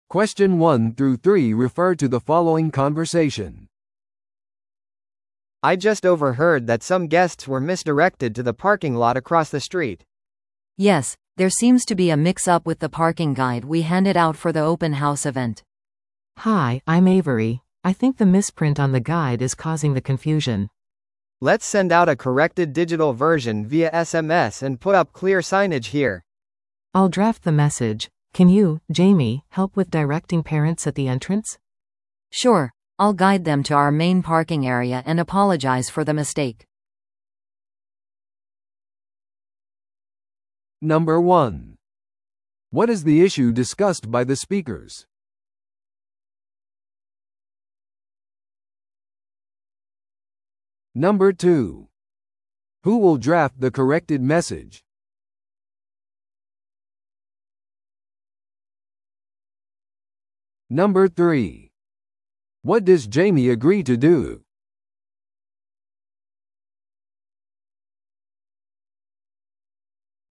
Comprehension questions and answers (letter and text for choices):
Listen to the audio below and answer the questions.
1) What is the issue discussed by the speakers?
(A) 駐車場案内の誤植。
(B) 駐車スペースの不足。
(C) オープンハウスのスケジュールの誤り。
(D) デジタルガイドのアクセス問題。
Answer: (A) 駐車場案内の誤植。

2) Who will draft the corrected message?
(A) その男性。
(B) エイヴリーに話しかけていた女性。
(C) ジェイミーと呼ばれた女性。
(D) エイヴリー。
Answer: (D) エイヴリー。

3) What does Jamie agree to do?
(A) SMS通知を送ること。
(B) ガイドの誤植を修正すること。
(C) 入り口に看板を立てること。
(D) 保護者を正しい駐車場に案内すること。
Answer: (D) 保護者を正しい駐車場に案内すること。

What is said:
A: I just overheard that some guests were misdirected to the parking lot across the street.
B: Yes, there seems to be a mix-up with the parking guide we handed out for the open house event.
C: Hi, I'm Avery. I think the misprint on the guide is causing the confusion.
A: Let's send out a corrected digital version via SMS and put up clear signage here.
C: I'll draft the message. Can you, Jamie, help with directing parents at the entrance?
B: Sure, I'll guide them to our main parking area and apologize for the mistake.